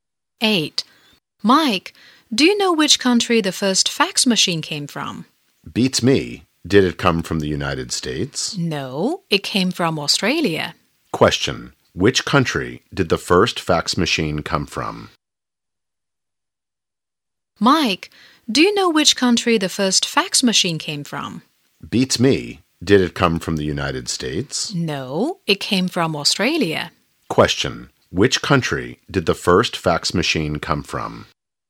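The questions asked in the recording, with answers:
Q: Which country did the first fax machine come from?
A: Australia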